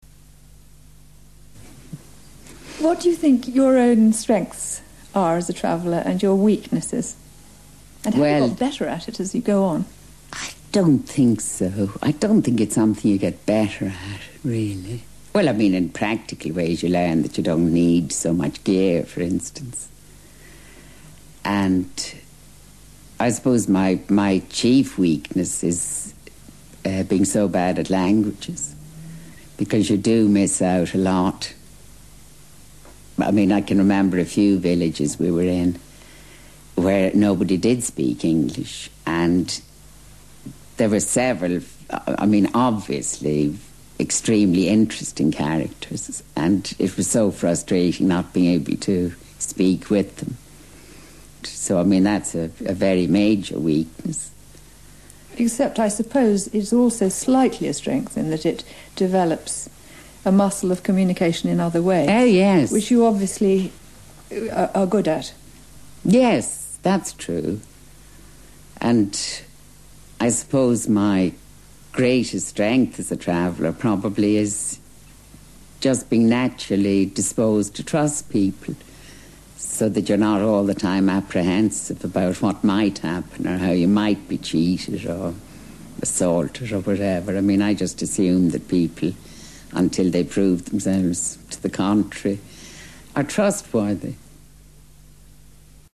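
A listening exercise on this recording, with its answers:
ACTIVITY 17: Read again the transcription above and mark if each statement is TRUE or FALSE. Correct the statements you think are FALSE in the blank spaces. Then check the correct answers.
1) Marsha Muller praises herself for being good at languages.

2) In some villages on her last journey an interpreter would have been useful.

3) The speakers agree with each other about one advantage of being bad at languages.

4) When Marsha Muller travels, she doesn't trust anybody she meets.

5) She thinks it's a weakness to trust people when you travel.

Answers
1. FALSE
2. TRUE
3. TRUE
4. FALSE
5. FALSE

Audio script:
What do you think your own strengths are as a traveller and your weaknesses?
Well ...
And have you got better at it as you go on?
I don't think so. I don't think it's something you get better at, really. Well, I mean in practical ways you learn that you don't need so much gear for instance. 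And ... I suppose my, my chief weakness is er being so bad at languages because you do miss out a lot. I mean I can remember a few villages we were in where nobody did speak English and there were several, I, I mean obviously extremely interesting characters and it was so frustrating not being able to speak with them. So I mean that's a very major weakness.
Except I suppose it's also slightly a strength in that it develops a muscle of communication in other ways ...
Oh, yes ...
... which you obviously are good at.
Yes, that's true. And I suppose my greatest strength as a traveller probably is just being naturally disposed to trust people, so that you're not all the time apprehensive about what might happen or how you might be cheated or assaulted or whatever. I mean I just assume that people, until they prove themselves to the contrary, are trustworthy.

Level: First Certificate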